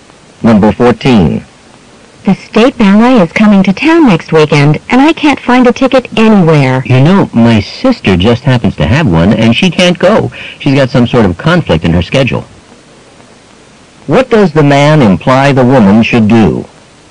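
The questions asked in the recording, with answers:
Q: What does the man imply the woman should do?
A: Get the ticket from his sister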